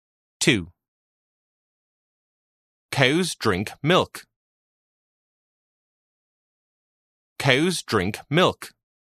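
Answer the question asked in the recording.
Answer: False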